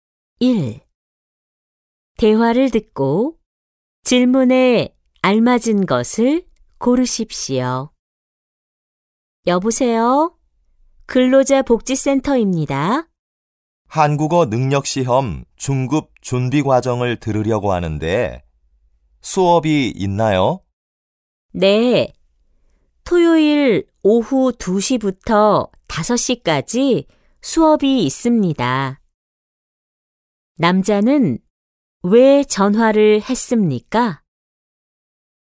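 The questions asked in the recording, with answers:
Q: 남자는 왜 전화를 했습니까?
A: 한국어 능력시험 중급 준비 과정 수업이 있는지 물어보려고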